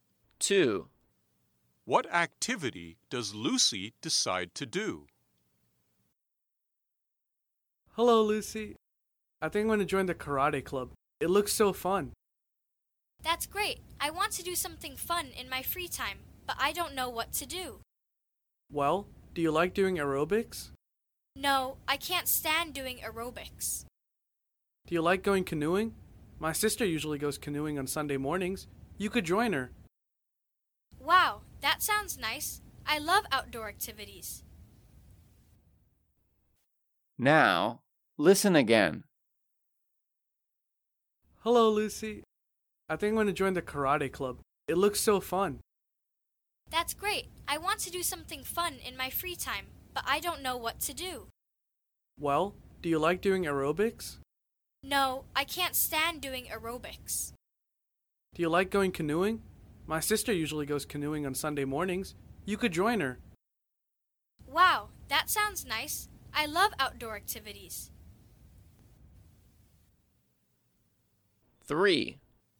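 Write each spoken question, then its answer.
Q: What activity does Lucy decide to do?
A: going canoeing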